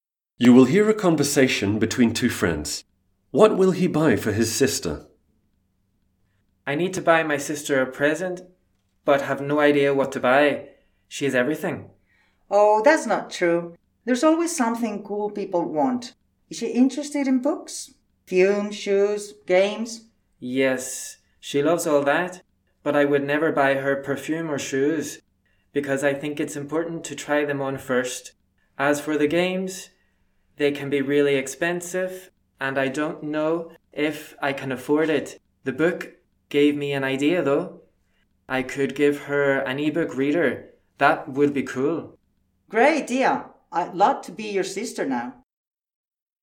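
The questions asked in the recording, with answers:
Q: What will he buy for his sister?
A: an ebook reader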